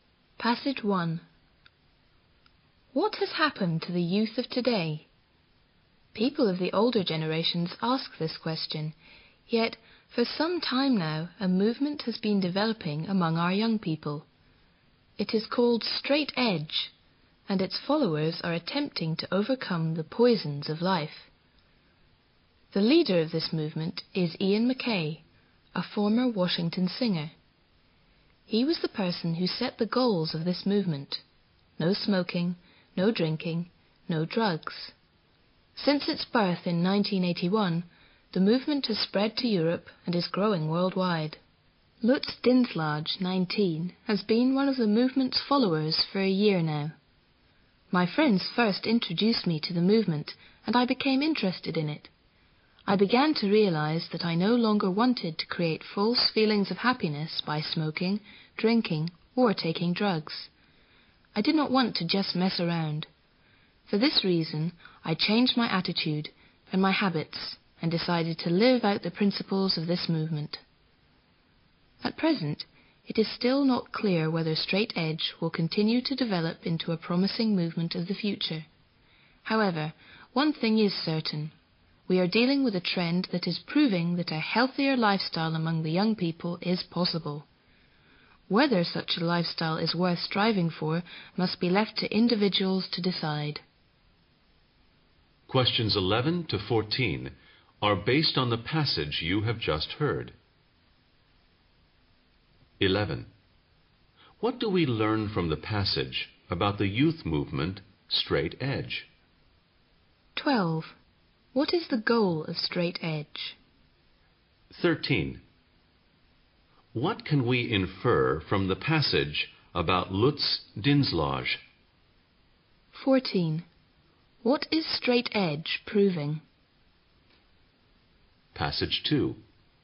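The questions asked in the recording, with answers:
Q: What is the goal of Straight Edge?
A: No smoking, no drinking, no drugs

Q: What is Straight Edge proving?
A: A healthier lifestyle among young people is possible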